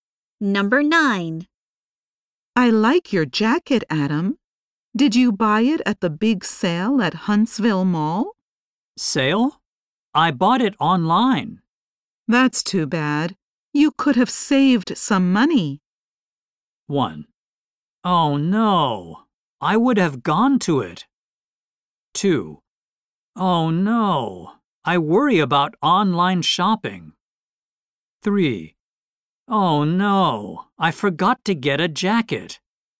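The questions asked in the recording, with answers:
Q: That's too bad. You could have saved some money.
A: 1: Oh no, I would have gone to it.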